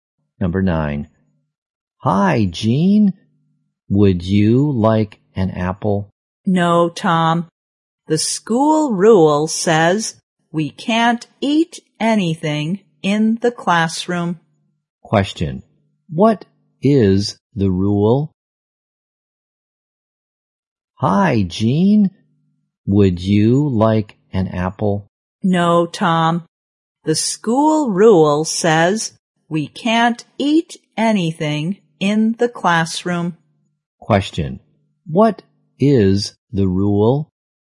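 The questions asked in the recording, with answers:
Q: What is the rule?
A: They can't eat anything in the classroom.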